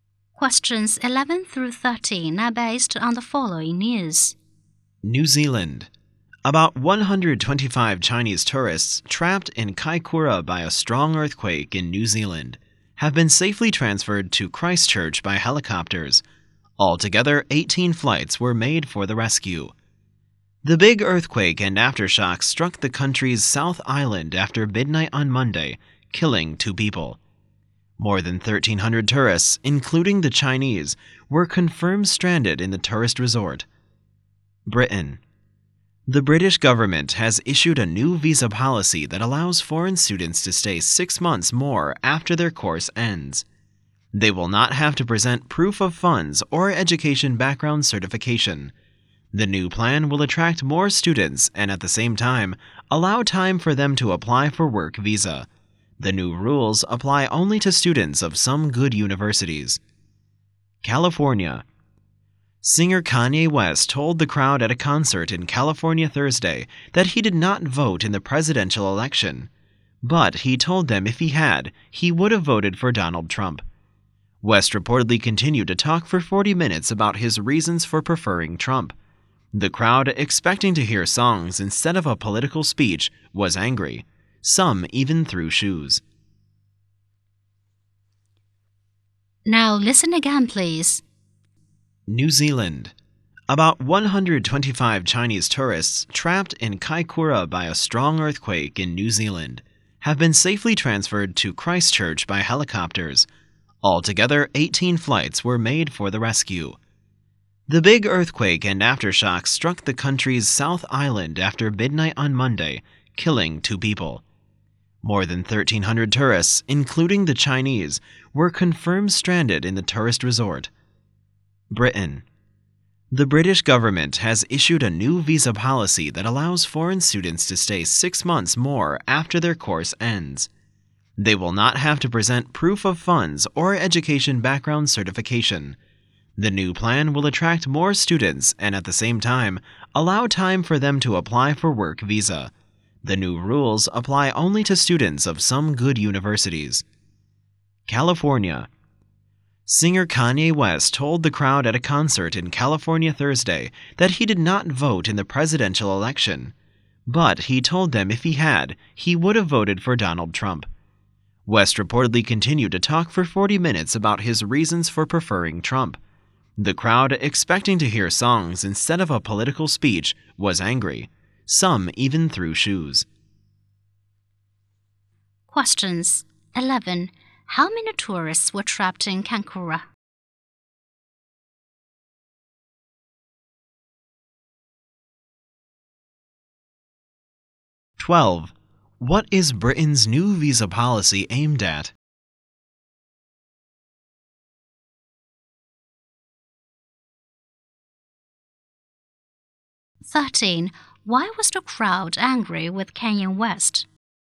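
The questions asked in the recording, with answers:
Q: What is Britain's new visa policy aimed at?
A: Attracting more foreign students.

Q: Why was the crowd angry with Kanye West?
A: He gave a political speech instead of singing.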